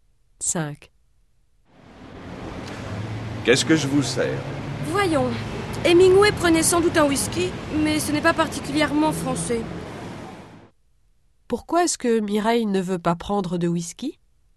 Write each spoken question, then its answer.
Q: Pourquoi est-ce que Mireille ne veut pas prendre de whisky?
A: Parce que ce n'est pas particulièrement français.